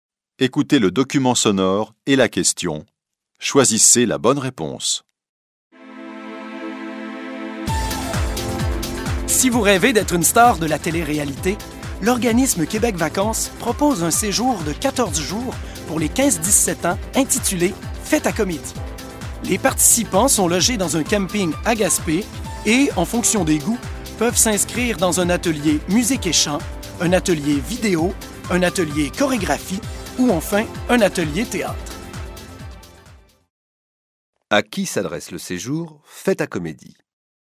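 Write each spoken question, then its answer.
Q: À qui s'adresse le séjour « Fête à comédie »?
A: Aux 15-17 ans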